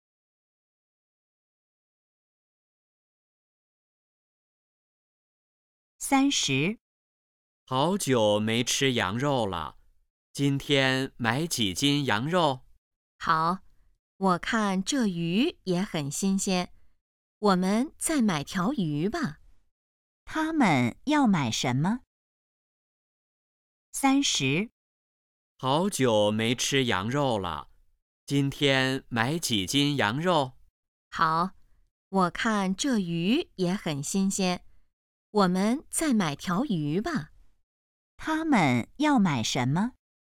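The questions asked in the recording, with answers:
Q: 他们要买什么?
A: 羊肉和鱼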